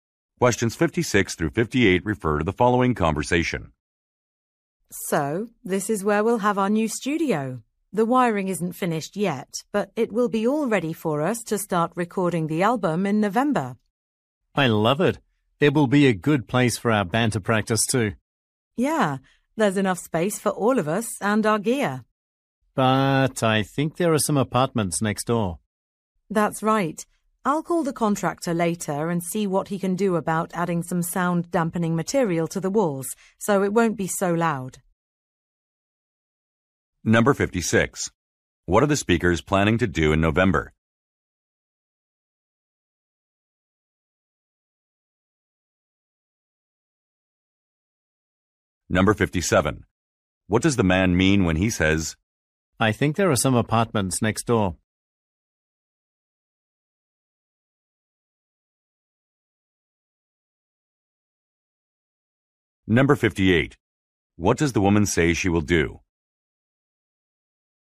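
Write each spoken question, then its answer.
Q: What are the speakers planning to do in November?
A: Start recording an album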